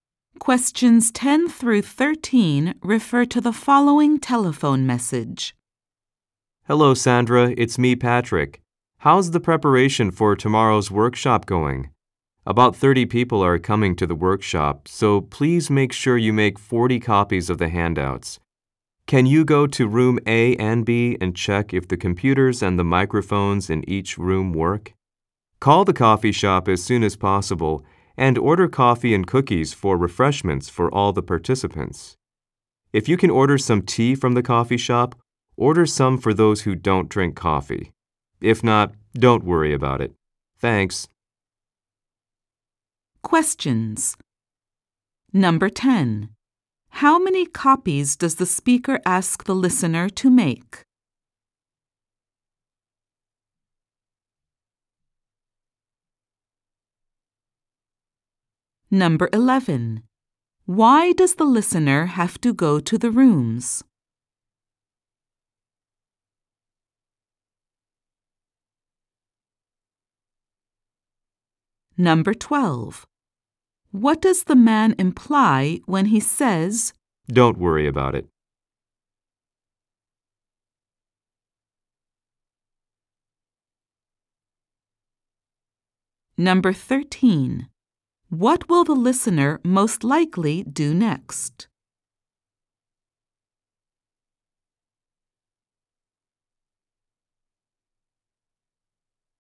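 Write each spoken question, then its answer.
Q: How many copies does the speaker ask the listener to make?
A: 40 copies of the handouts

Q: Why does the listener have to go to the rooms?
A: To check that the computers and microphones work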